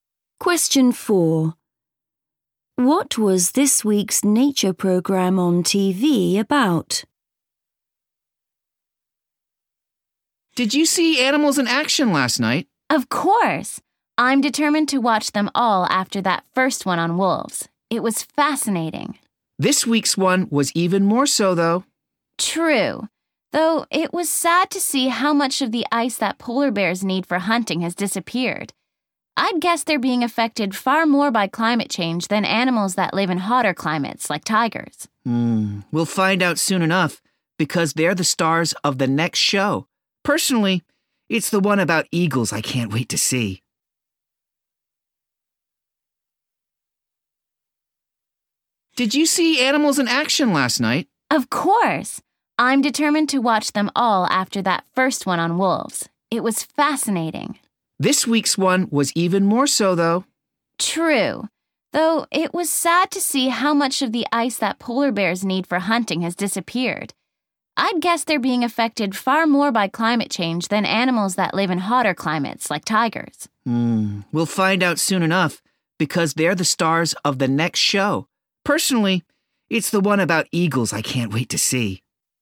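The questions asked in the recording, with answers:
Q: What was this week's nature programme on TV about?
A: polar bears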